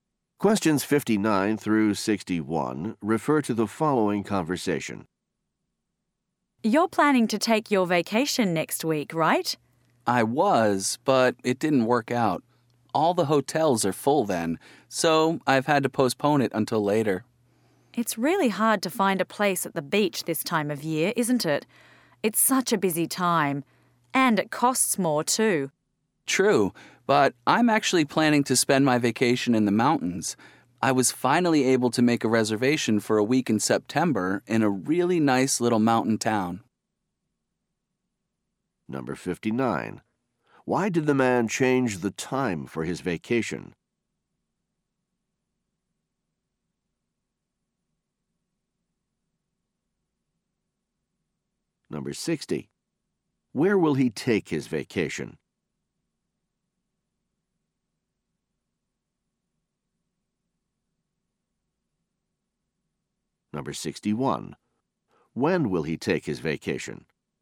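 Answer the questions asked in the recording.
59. All the hotels were full
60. In the mountains
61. In September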